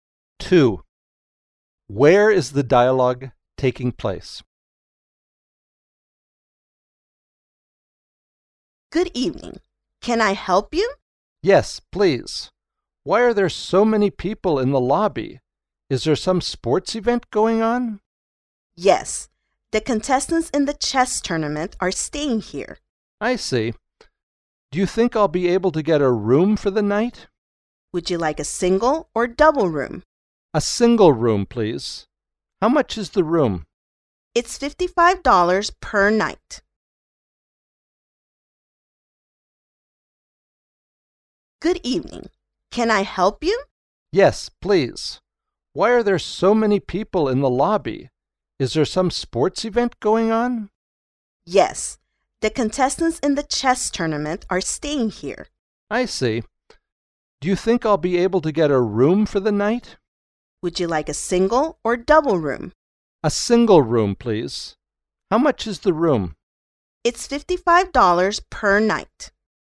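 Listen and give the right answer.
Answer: At a hotel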